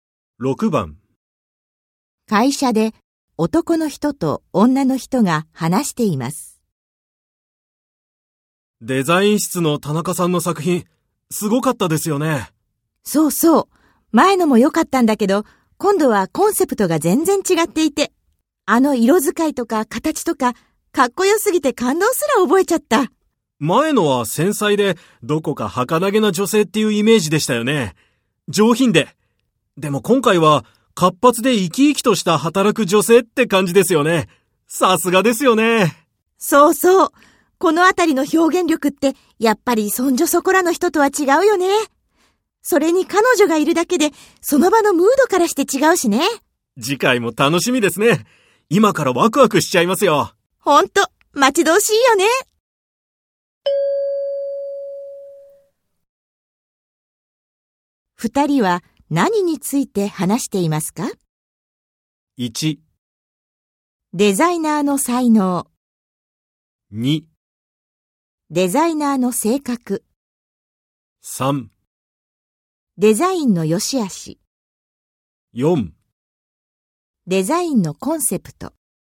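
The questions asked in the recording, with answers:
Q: 二人は何について話していますか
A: 1: デザイナーの才能。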